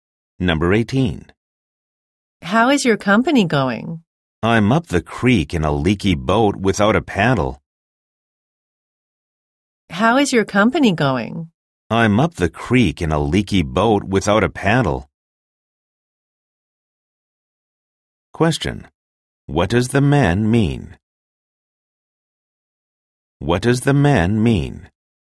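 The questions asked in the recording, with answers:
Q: What does the man mean?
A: His company is in serious trouble.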